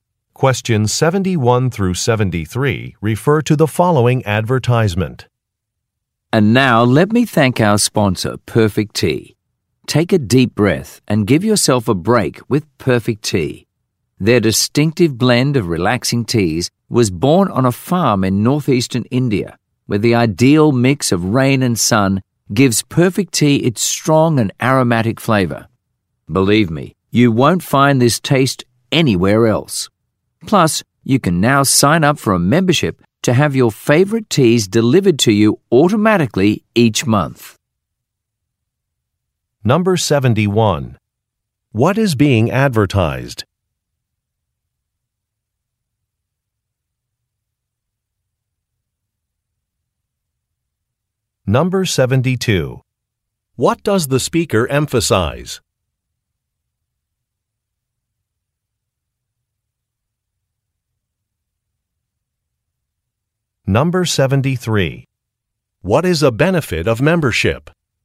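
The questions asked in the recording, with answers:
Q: What is being advertised?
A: A tea brand (Perfect Tea)

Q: What is a benefit of membership?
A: Automatic monthly delivery of teas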